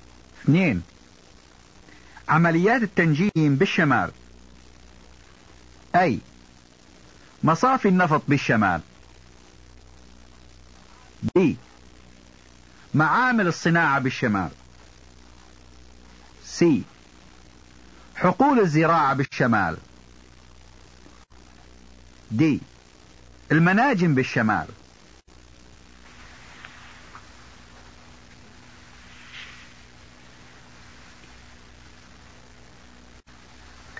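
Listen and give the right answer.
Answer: D: المناجم بالشمال.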